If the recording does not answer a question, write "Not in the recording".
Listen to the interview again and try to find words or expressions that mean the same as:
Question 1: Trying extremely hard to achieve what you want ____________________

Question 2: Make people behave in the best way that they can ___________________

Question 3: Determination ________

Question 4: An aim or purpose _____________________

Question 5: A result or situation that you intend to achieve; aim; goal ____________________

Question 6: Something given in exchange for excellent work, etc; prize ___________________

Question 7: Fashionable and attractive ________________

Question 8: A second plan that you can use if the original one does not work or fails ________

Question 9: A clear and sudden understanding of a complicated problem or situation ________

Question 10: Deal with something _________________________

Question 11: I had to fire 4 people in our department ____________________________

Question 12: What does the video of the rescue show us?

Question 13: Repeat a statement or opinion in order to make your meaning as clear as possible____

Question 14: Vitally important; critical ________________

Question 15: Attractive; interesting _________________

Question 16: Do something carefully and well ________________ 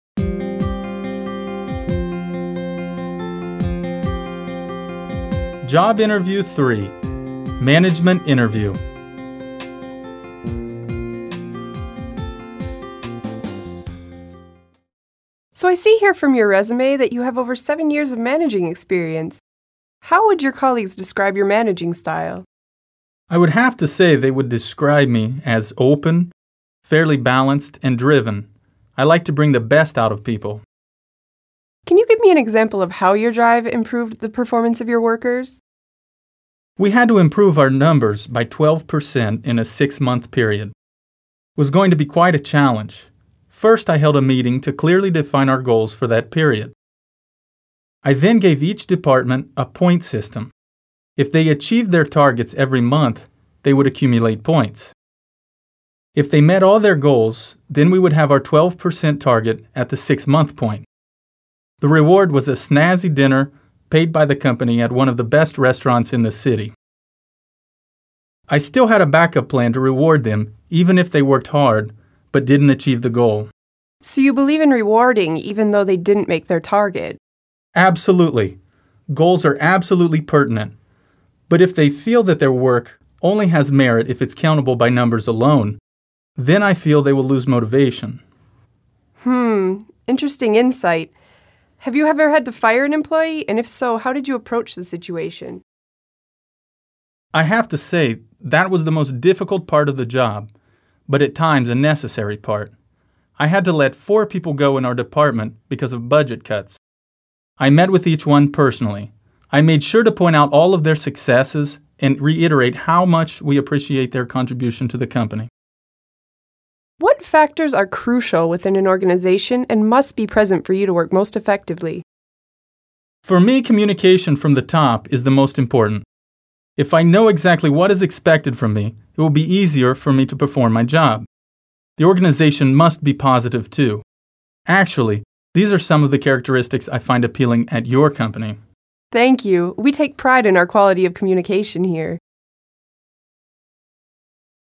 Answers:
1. Driven
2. Bring the best out of people
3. Drive
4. Goal
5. Target
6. Reward
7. Snazzy
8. A backup plan
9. Insight
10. Approach
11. I had to let 4 people go in our department
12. Not in the recording
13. Reiterate
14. Crucial
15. Appealing
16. Take pride in

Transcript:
How would your colleagues describe your managing style?
Interviewee: I would have to say that they would describe me as open, fairly balanced and driven. I like to bring the best out of people.
Interviewer: Can you give me an example of how your drive improved the performance of your workers.
Interviewee: We had to improve our numbers by 12% in a 6 month period. It was going to be quite a challenge. First, I held a meeting to clearly define our goals for that period. I then gave each department a point system. If they achieved their targets every month, they would accumulate points. If they met all their goals, then we would have our 12 % target at the 6 month point. The reward was a snazzy dinner paid by the company at one of the best restaurants in the city. I still had a backup plan to reward them even if they worked hard but didn't achieve the goal.
Interviewer: So you believe in rewarding even though they didn't make their target?
Interviewee: Absolutely. Goals are absolutely pertinent, but if they feel that their work only has merit if its countable by numbers only, then I feel they will lose motivation.
Interviewer: Hmm, interesting insight. Have you ever had to fire an employee and if so, how did you approach the situation?
Interviewee: I have to say, that was the most difficult part of the job, but at times a necessary part. I had to let 4 people go in our department because of budget cuts. I met with each one personally. I made sure to point out all their successes and reiterate how much we appreciated their contribution to the company.
Interviewer: What factors are crucial within an organization and must be present for you to work most effectively?
Interviewee: For me, communication from the top is the most important. If I know what exactly is expected from me, it will be easier for me to perform my job. The organization must be positive too. Actually, these are some of the characteristics I find appealing at your company.
Interviewee: Thank you. We take pride in our quality of communication here.

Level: B2/C1 level